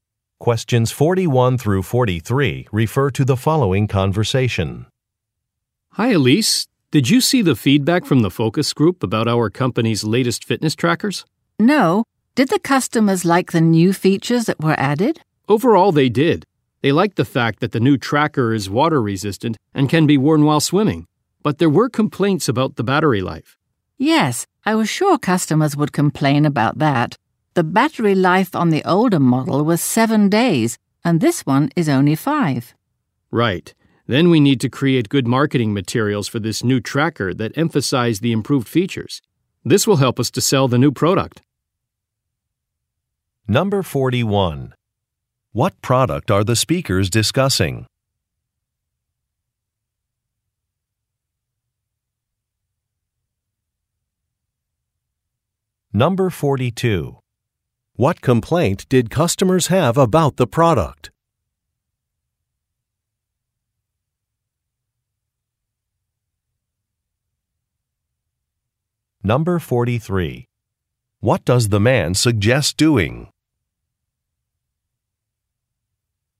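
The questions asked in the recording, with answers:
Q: What product are the speakers discussing?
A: Fitness trackers

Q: What complaint did customers have about the product?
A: The battery life is too short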